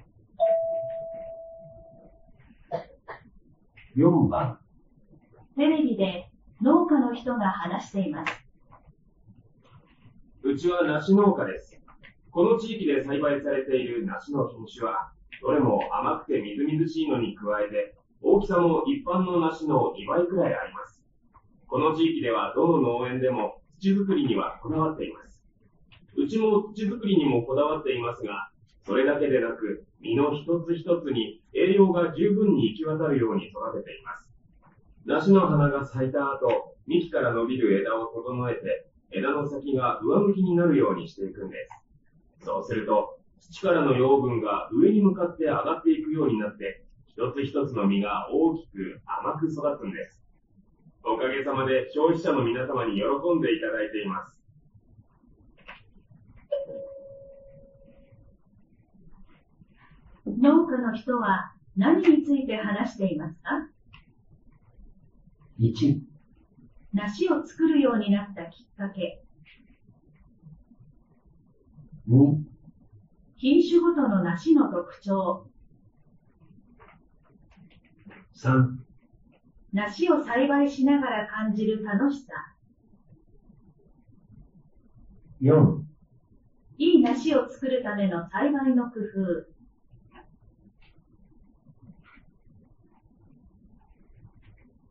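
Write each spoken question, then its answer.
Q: 農家の人は何について話していますか?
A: 4: いい梨を作るための栽培の工夫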